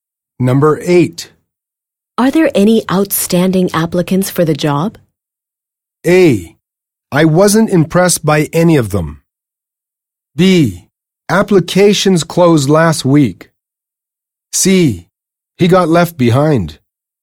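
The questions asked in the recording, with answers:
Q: Are there any outstanding applicants for the job?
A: A: I wasn't impressed by any of them.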